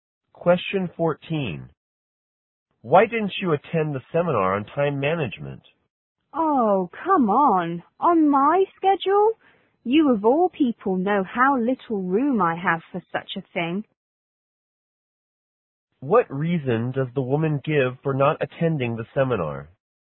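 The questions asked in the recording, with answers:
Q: What reason does the woman give for not attending the seminar?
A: She has too busy a schedule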